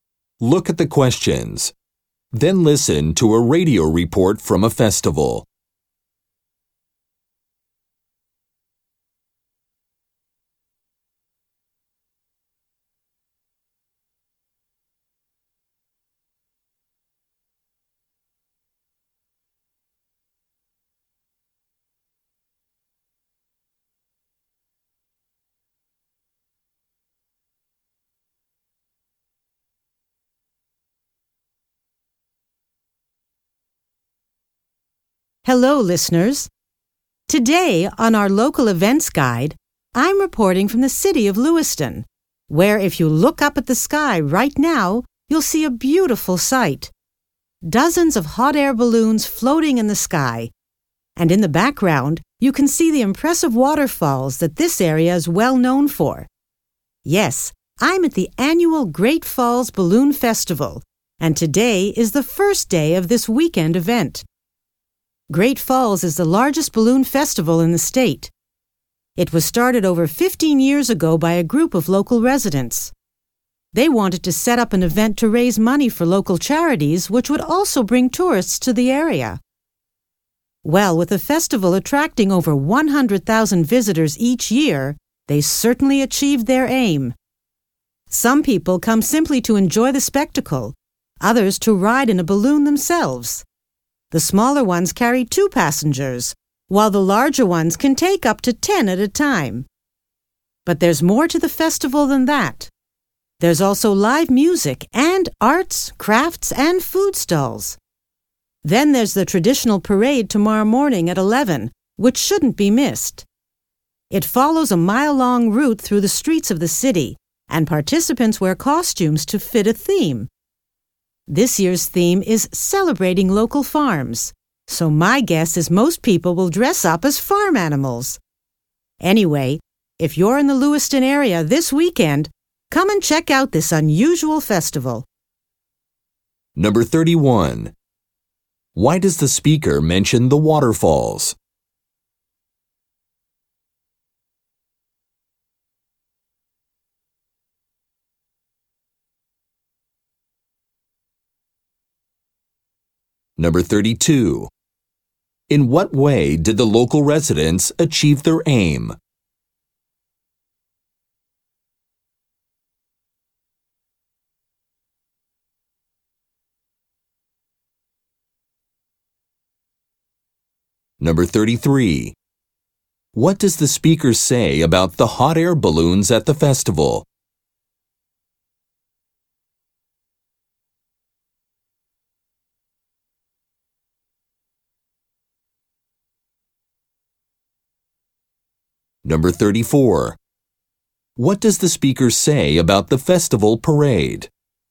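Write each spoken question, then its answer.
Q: In what way did the local residents achieve their aim?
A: The festival raises money for local charities and attracts over 100,000 visitors a year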